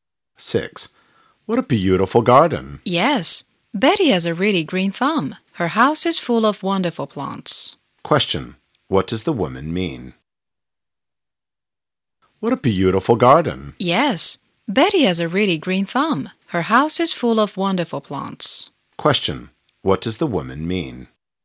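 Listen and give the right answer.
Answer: Betty is good at growing plants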